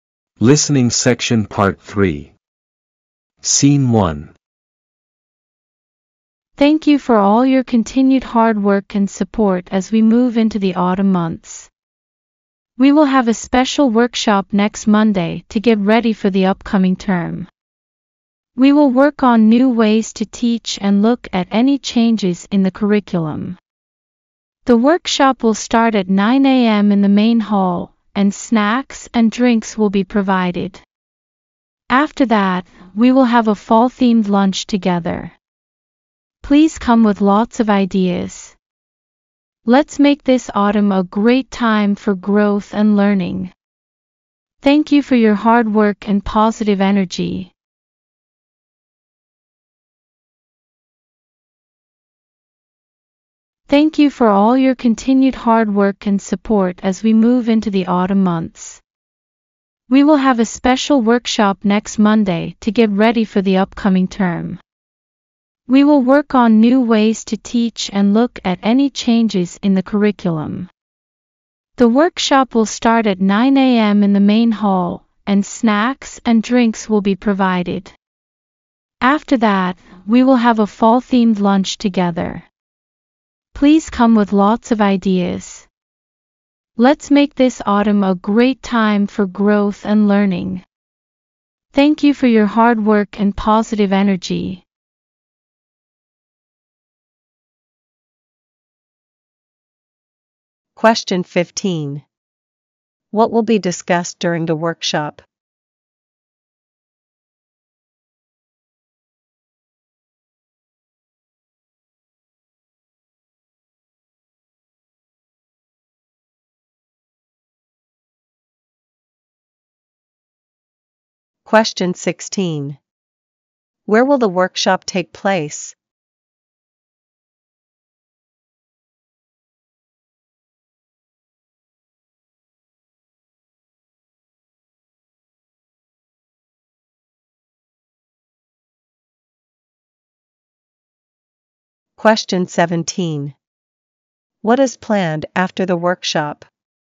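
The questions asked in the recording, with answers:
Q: What will be discussed during the workshop?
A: New ways to teach and changes in the curriculum

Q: Where will the workshop take place?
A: In the main hall

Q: What is planned after the workshop?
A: A fall-themed lunch together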